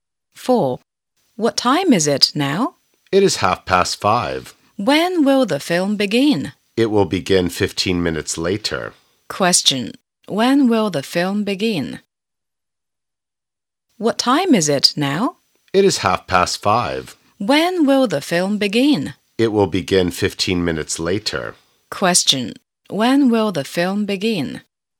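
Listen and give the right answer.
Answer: At 5:45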